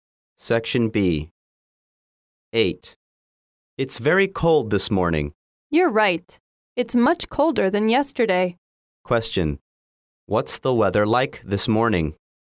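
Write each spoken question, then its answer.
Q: What's the weather like this morning?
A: Very cold, colder than yesterday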